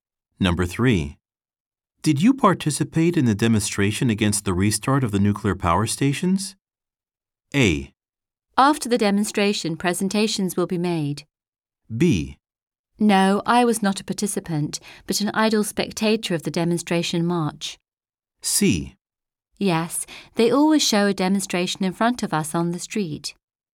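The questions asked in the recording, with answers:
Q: Did you participate in the demonstration against the restart of the nuclear power stations?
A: B: No, I was not a participant, but an idle spectator of the demonstration march.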